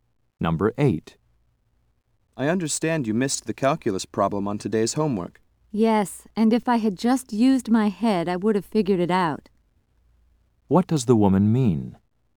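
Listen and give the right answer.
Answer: She could have solved it if she had thought carefully.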